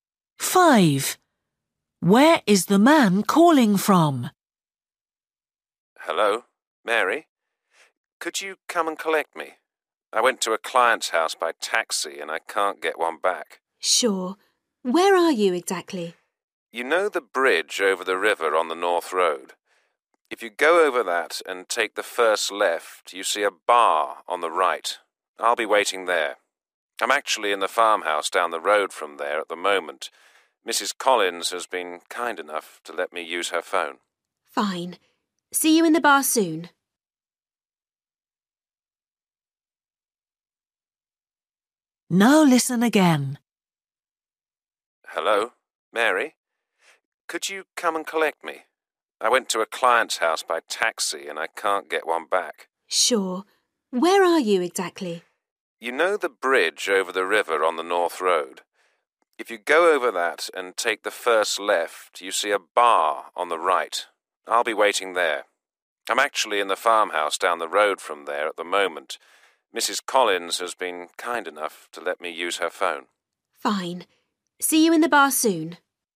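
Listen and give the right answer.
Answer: a farmhouse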